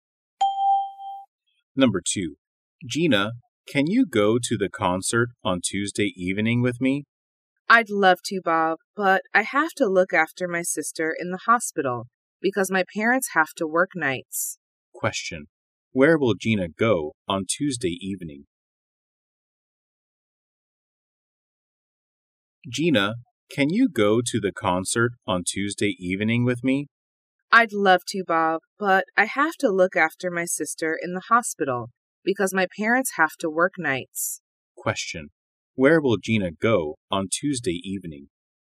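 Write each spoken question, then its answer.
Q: Where will Gina go on Tuesday evening?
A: To the hospital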